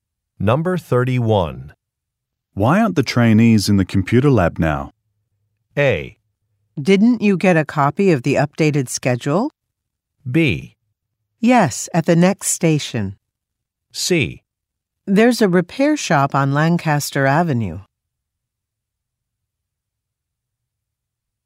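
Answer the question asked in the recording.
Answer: A: Didn't you get a copy of the updated schedule?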